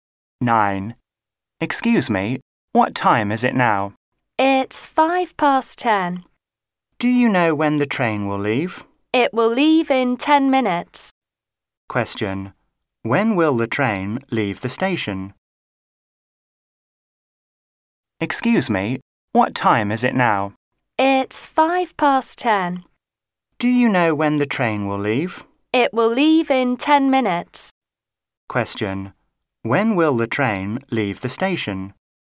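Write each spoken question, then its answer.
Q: When will the train leave the station?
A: At 10:15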